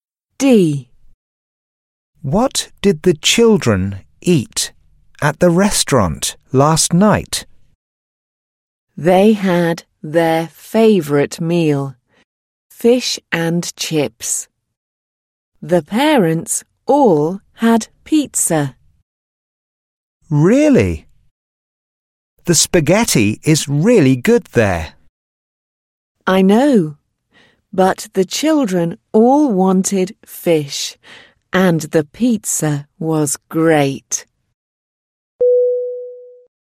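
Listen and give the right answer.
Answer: Fish and chips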